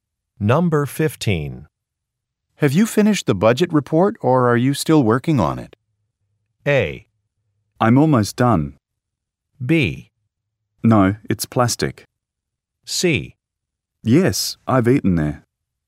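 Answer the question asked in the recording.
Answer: A: I'm almost done.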